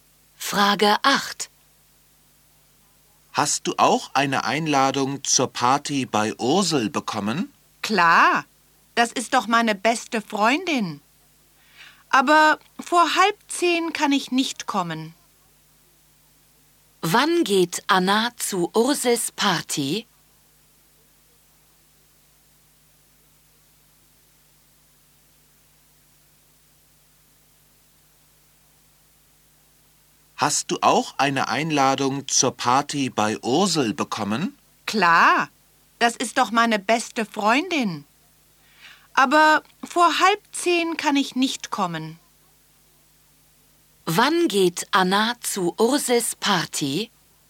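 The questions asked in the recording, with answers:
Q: Wann geht Anna zu Ursels Party?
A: Nicht vor 9:30 Uhr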